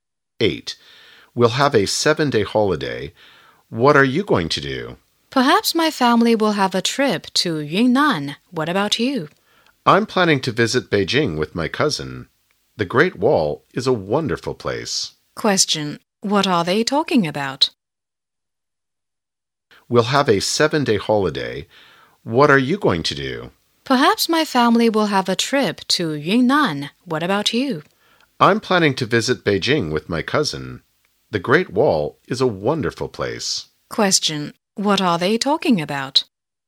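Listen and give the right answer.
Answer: Their holiday plans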